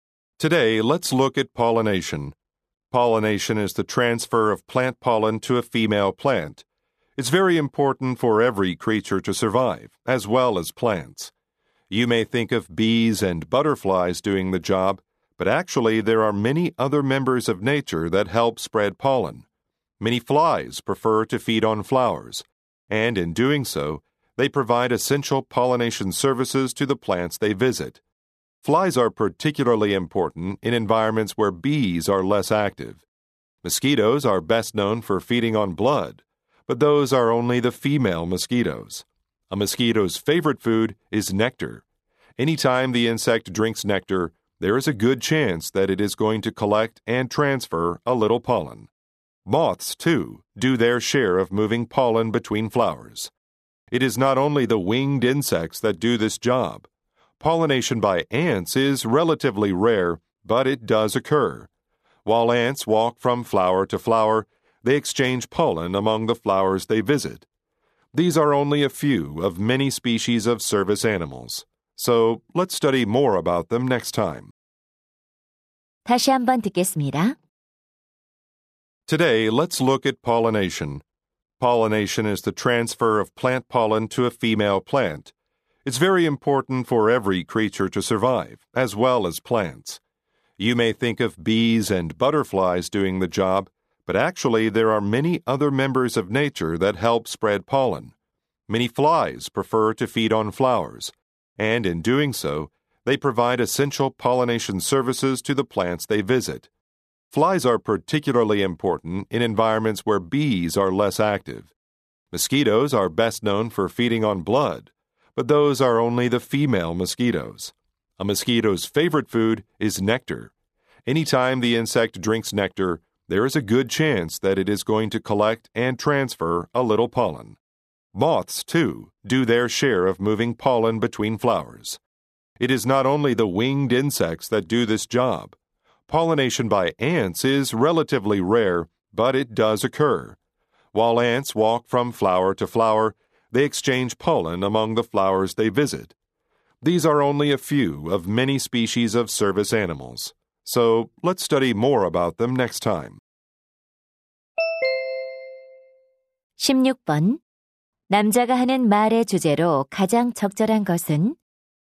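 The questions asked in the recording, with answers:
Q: 남자가 하는 말의 주제로 가장 적절한 것은?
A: 벌과 나비 외에 꽃가루를 옮기는 다양한 곤충들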